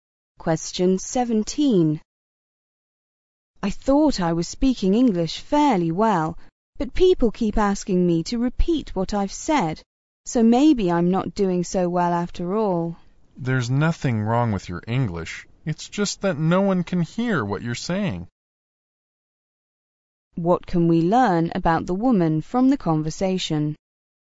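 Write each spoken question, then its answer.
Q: What can we learn about the woman from the conversation?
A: She speaks too softly to be heard.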